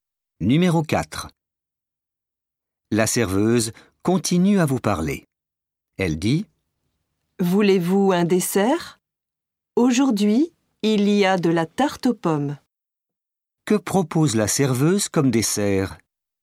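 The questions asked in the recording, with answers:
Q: Que propose la serveuse comme dessert?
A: De la tarte aux pommes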